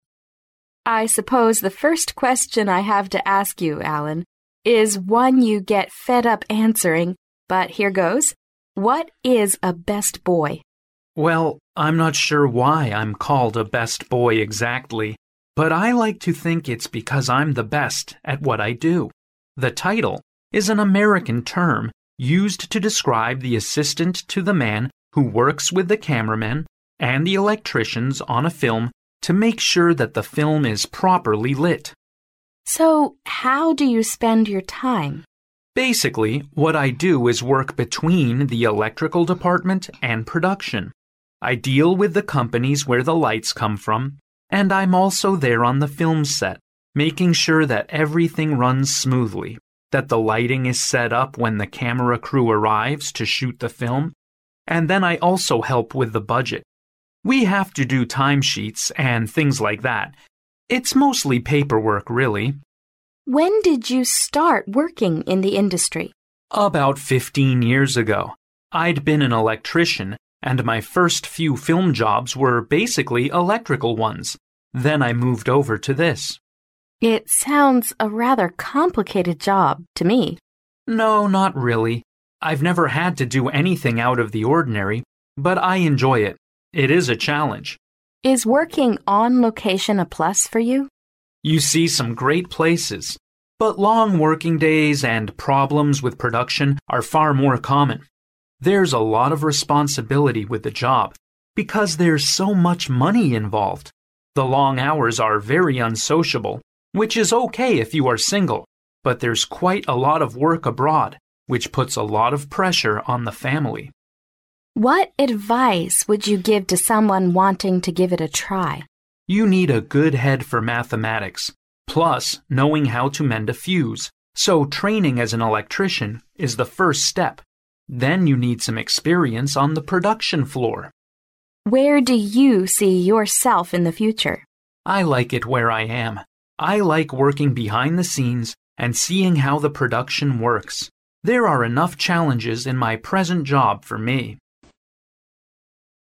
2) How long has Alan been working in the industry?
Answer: Fifteen years.

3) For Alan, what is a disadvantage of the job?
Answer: The pressure on his family.

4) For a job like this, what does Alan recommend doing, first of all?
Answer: Receiving training as an electrician.

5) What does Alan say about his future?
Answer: He will continue doing the same job.

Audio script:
[听力原文] W: I suppose the first question I have to ask you, Alan, is one you get fed up answering, but here it goes. What is a best boy? M: Well, I am not sure why I am called a best boy exactly. But I like to think it is because I am the best at what I do. The title is an American term, used to describe the assistant to the man who works with the cameraman and electricians on a film to make sure that the film is properly lit. W: So how do you spend your time? M: Basically what I do is work between the electrical department and production. I deal with the companies where the lights come from. And I am also there on the film site, making sure that everything runs smoothly, that the lighting is set up when the camera crew arrives to shoot the film. And then I also help with the budget. We have to do time sheets and things like that. It is mostly paper work really. W: When did you start working in the industry? M: About 15 years ago. I had been an electrician and my first few film jobs were basically electrical ones. Then I moved over to this. W: It sounds a rather complicated job to me. M: No, not really. I've never had to do anything out of the ordinary. But I enjoy it. It is a challenge. W: Is working on location a plus for you? M: You see some great places, but long working days and problems with production are far more common. There is a lot of responsibility with the job, because there is so much money involved. The long hours are very unsociable which is OK if you are single. But there is quite a lot of work abroad, which puts a lot of pressure on the family. W: What advise would you give to someone wanting to give it a try? M: You need a good head for mathematics, plus knowing how to mind the fields? So training as an electrician is the first step. Then you need some experience on a production floor. W: Where do you see yourself in the future? M: I like it where I am. I like working behind the scenes, and seeing how the production works. There are enough challenges in my present job for me.